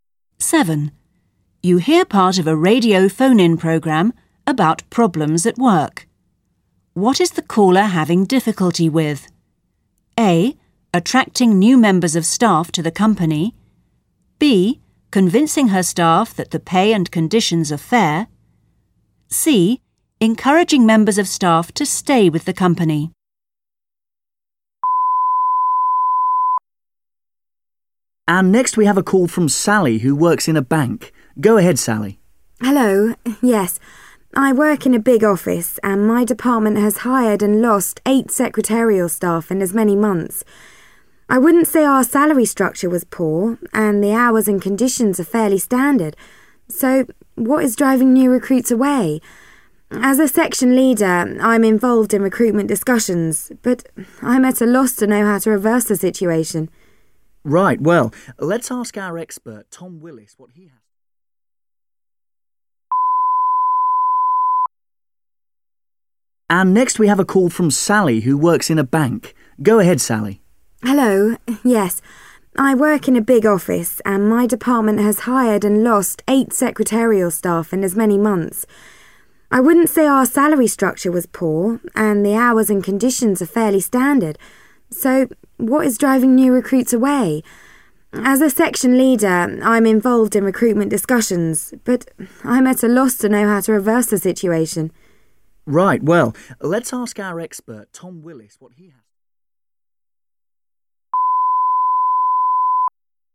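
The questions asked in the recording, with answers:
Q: What is the caller having difficulty with?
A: C: Encouraging members of staff to stay with the company.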